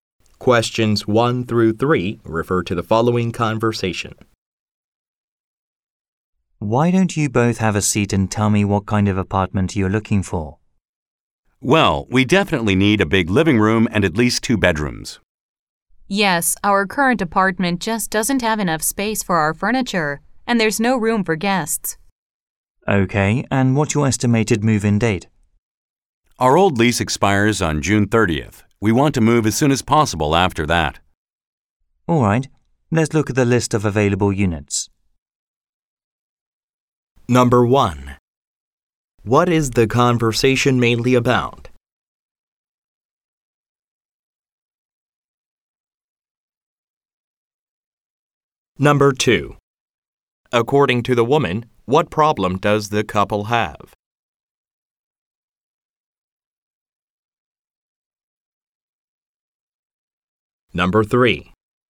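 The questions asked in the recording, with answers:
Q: What is the conversation mainly about?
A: Looking for a new apartment

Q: According to the woman, what problem does the couple have?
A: Their current apartment doesn't have enough space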